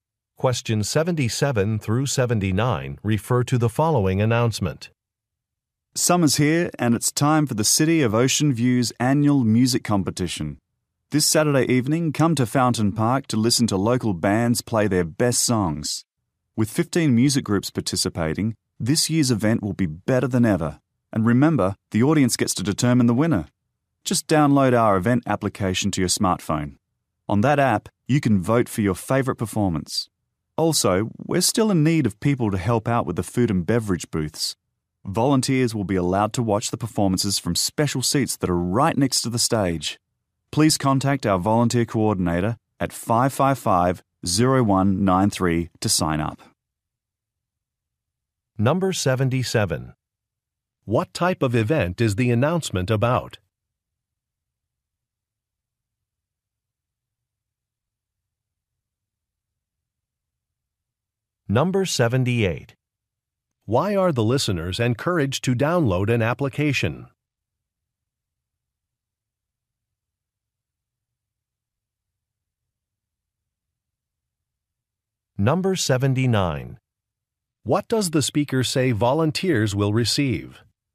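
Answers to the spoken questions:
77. A music competition
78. To vote for their favorite performance
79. Special seats next to the stage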